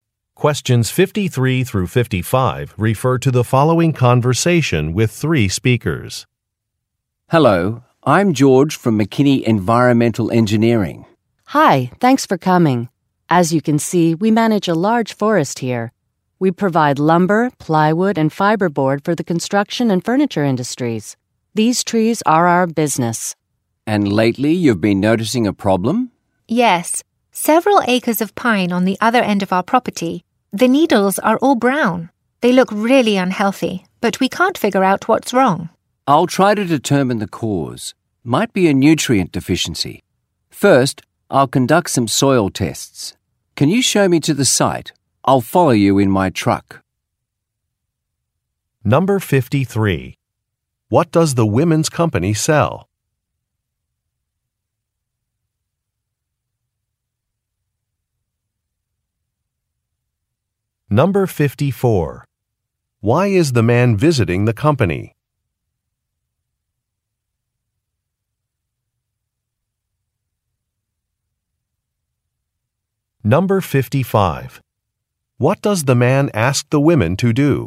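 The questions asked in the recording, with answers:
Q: What does the women's company sell?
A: Wood products such as lumber, plywood and fiberboard

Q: Why is the man visiting the company?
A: To find out why some pine trees look unhealthy

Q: What does the man ask the women to do?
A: Show him to the site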